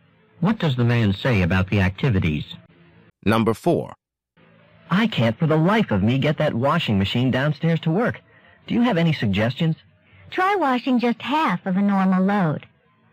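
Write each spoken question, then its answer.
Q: What does the woman suggest the man do?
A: Wash a smaller load, about half of a normal one.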